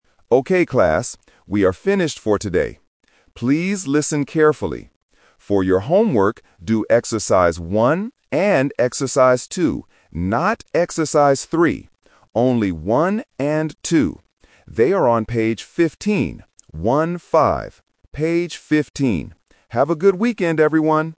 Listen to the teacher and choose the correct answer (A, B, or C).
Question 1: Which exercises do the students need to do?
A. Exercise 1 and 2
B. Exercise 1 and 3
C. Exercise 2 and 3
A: A

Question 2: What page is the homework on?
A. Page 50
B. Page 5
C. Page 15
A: C

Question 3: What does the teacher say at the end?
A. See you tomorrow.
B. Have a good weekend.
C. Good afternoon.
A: B

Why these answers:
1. The teacher clearly says, "For your homework, do exercise one and exercise two." Option (B) and (C) are traps because he explicitly tells them: "Not exercise three!".
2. The teacher says the homework is on "page fifteen" and clarifies by spelling out the numbers "One-five." Option (A) is a very common A1 phonetic trap (fifteen vs. fifty).
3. At the very end of the recording, the teacher says, "Have a good weekend, everyone!". Options (A) and (C) are common teacher greetings/farewells but are not mentioned in this audio.

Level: A1

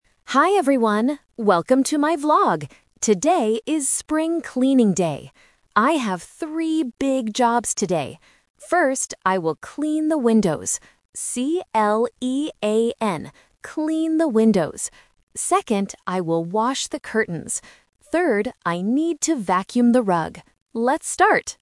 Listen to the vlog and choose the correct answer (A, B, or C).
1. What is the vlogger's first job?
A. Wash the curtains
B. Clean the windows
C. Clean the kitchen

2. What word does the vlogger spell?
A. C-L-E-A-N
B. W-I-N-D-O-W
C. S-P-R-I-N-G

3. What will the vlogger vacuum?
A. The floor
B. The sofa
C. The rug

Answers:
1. B
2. A
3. C

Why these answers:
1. The vlogger clearly says, "First, I will clean the windows." Why the trap is wrong: "Wash the curtains" (A) is the second job, not the first. "Clean the kitchen" (C) is a normal housework task but is never mentioned in the audio.
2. The vlogger says the word and spells it out: "C-L-E-A-N". Why the trap is wrong: "Window" (B) and "Spring" (C) are important words in the vlog, but the speaker does not spell them.
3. The vlogger says, "Third, I need to vacuum the rug." Why the trap is wrong: "The floor" (A) and "The sofa" (B) are things people often vacuum in their houses, but they are not mentioned in the audio.

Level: A1

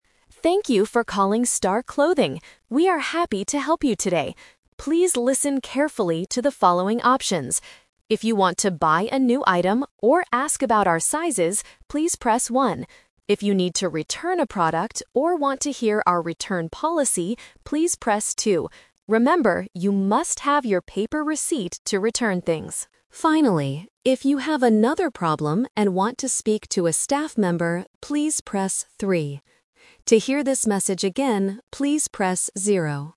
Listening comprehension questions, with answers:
Listen to the automated phone message. Read the questions and choose the correct answer (A, B, or C).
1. What number should a customer press to return a product?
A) 1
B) 2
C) 3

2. What must a customer have to return an item?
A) A paper receipt.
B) A credit card.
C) The original box.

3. Why would a customer press 3?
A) To hear the message again.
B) To buy some new clothes.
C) To talk to a store worker.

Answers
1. B
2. A
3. C

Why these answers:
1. The automated voice says, "If you need to return a product... please press 2."
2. The message clearly states, "Remember, you must have your paper receipt to return things."
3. The voice says to press 3 if you "want to speak to a staff member." A staff member is the same as a store worker.

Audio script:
Automated Voice: Thank you for calling Star Clothing. We are happy to help you today. Please listen carefully to the following options.
If you want to buy a new item or ask about our sizes, please press 1.
If you need to return a product or want to hear our return policy, please press 2. Remember, you must have your paper receipt to return things.
Finally, if you have another problem and want to speak to a staff member, please press 3.
To hear this message again, please press 0.

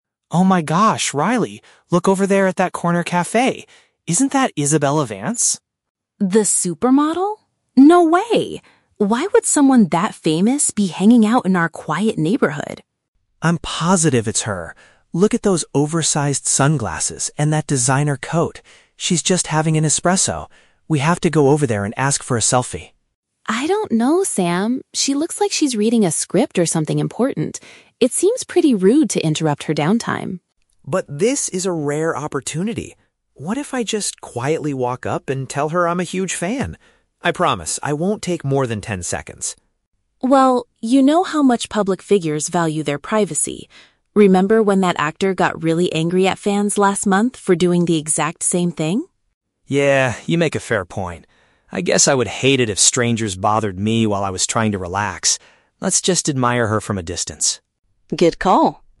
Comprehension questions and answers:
Listen to the conversation between two friends and choose the correct answer (A, B, or C) for each question.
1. Why does Riley initially doubt that the woman is Isabella Vance?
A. Because the woman is wearing oversized sunglasses that hide her face.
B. Because she thinks a celebrity wouldn't visit their local area.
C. Because she knows Isabella Vance is currently traveling abroad.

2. Why does Riley think it is a bad idea to approach the model?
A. Because Isabella Vance is known to dislike taking photos with fans.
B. Because the cafe has strict rules about bothering its customers.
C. Because the model appears to be busy and enjoying her private time.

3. What do the friends ultimately decide to do?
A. They decide to leave the celebrity alone and respect her personal space.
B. They plan to wait for her to finish her coffee before asking for a picture.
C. Sam decides to quickly run over and take a photo in ten seconds.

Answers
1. B
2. C
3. A

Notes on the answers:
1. Riley says, "Why would someone that famous be hanging out in our quiet neighborhood?" This implies she doesn't believe a big celebrity would visit their specific, quiet local area.
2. Riley notes that Isabella looks like she is "reading a script" and it would be rude to "interrupt her downtime" (which paraphrases to being busy and enjoying private time).
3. At the end of the conversation, Sam agrees with Riley and says, "Let's just admire her from a distance," meaning they will not approach her (respecting her personal space).

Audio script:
Sam: Oh my gosh, Riley, look over there at that corner café! Isn't that Isabella Vance?
Riley: The supermodel? No way. Why would someone that famous be hanging out in our quiet neighborhood?
Sam: I'm positive it's her. Look at those oversized sunglasses and that designer coat. She's just having an espresso. We have to go over there and ask for a selfie!
Riley: I don't know, Sam. She looks like she's reading a script or something important. It seems pretty rude to interrupt her downtime.
Sam: But this is a rare opportunity! What if I just quietly walk up and tell her I'm a huge fan? I promise I won't take more than ten seconds.
Riley: Well, you know how much public figures value their privacy. Remember when that actor got really angry at fans last month for doing the exact same thing?
Sam: Yeah, you make a fair point. I guess I would hate it if strangers bothered me while I was trying to relax. Let's just admire her from a distance.
Riley: Good call.

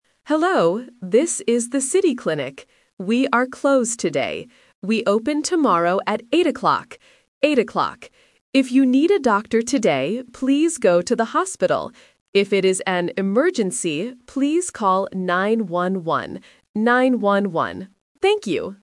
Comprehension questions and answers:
Listen to the voicemail. Circle the correct answer (A, B, or C).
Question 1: What place is this voicemail from?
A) A clinic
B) A hospital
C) A pharmacy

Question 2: What time does the place open tomorrow?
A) 8 o'clock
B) 9 o'clock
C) 10 o'clock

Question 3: What should you do if it is an emergency?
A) Call 911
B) Go to the hospital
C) Call the doctor tomorrow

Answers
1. A
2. A
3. A

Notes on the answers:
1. The automated voice says, "This is the City Clinic." Option B (A hospital) is the trap because the word "hospital" is mentioned later in the audio, but it is not the place you are calling. Option C is a plausible health-related place but is not mentioned.
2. The voice clearly says, "We open tomorrow at 8 o'clock," and repeats "Eight o'clock" (A1 repetition technique). Option B (9 o'clock) is a phonetic trap because the number "9" is mentioned right after in the emergency number "911". Option C is not in the audio.
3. The voice gives a direct instruction: "If it is an emergency, please call 911." Option B (Go to the hospital) is the main trap because it is the instruction for needing a doctor today, not specifically for an emergency. Option C is a plausible action but is not what the voicemail tells you to do.

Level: A1

